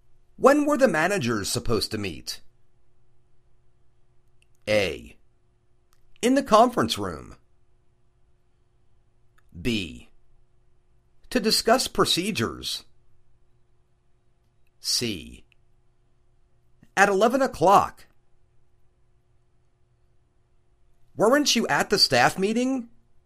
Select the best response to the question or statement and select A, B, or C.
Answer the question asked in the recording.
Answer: At 11 o'clock.